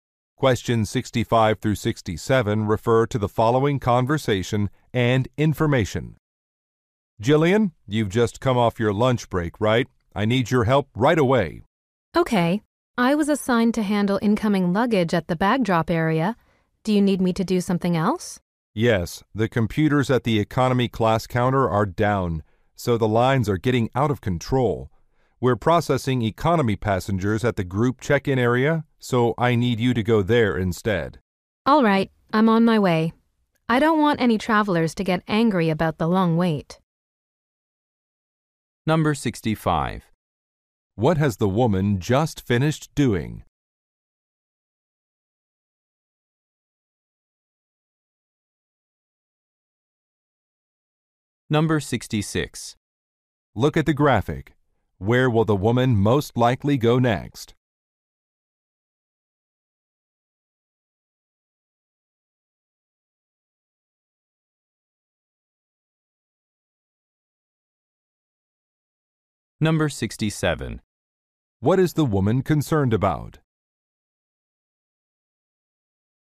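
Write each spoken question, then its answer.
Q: What has the woman just finished doing?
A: Her lunch break

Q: What is the woman concerned about?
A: Travelers getting angry about the long wait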